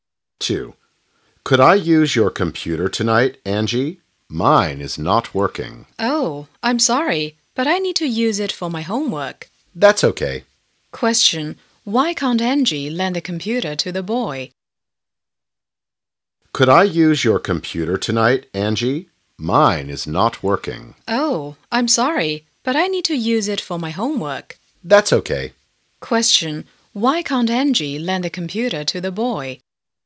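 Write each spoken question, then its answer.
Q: Why can't Angie lend the computer to the boy?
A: She needs to use it for her homework.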